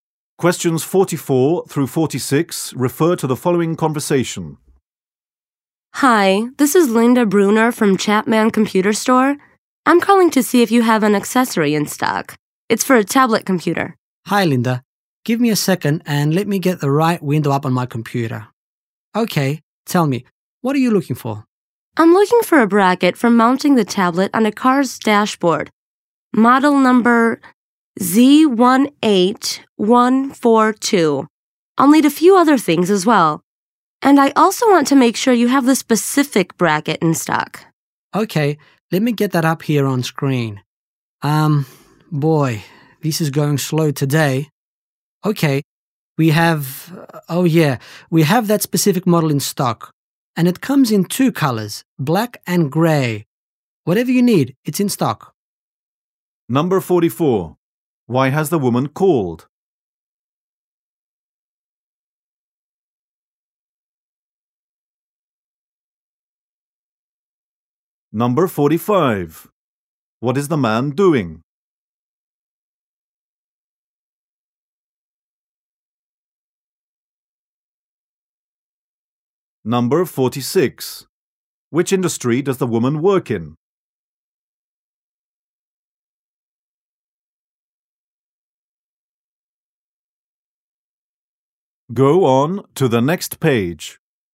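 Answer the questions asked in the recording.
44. To check if an accessory is in stock
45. Checking stock on his computer
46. Computer retail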